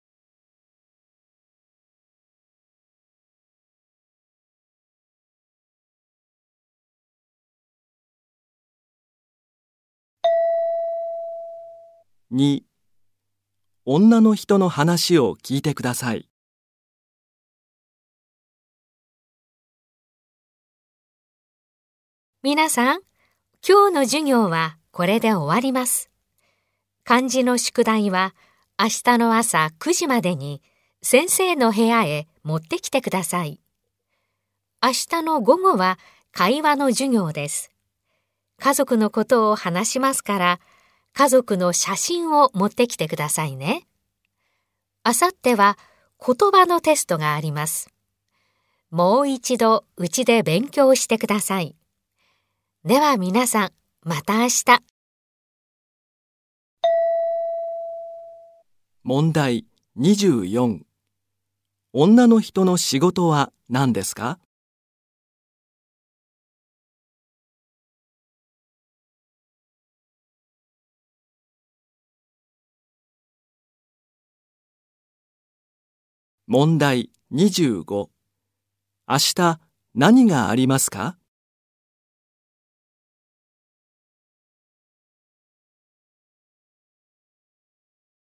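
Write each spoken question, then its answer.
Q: 女の人の仕事は何ですか?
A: 先生

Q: 明日何がありますか?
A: 会話の授業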